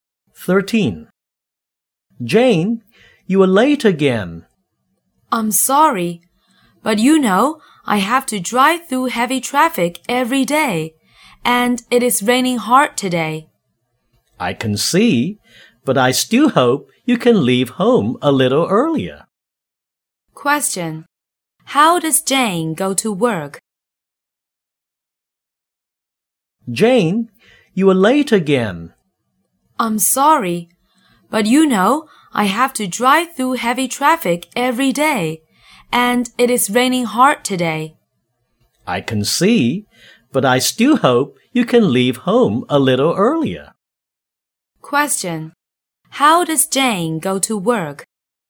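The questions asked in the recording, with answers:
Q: How does Jane go to work?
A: By car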